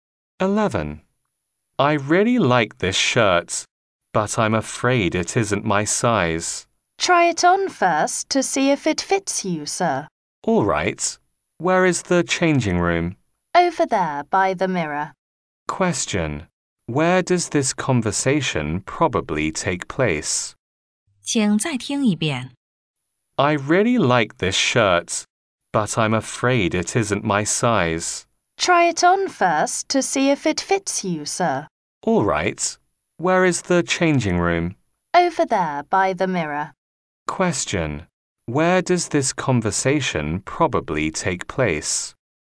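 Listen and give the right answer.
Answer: In a clothes shop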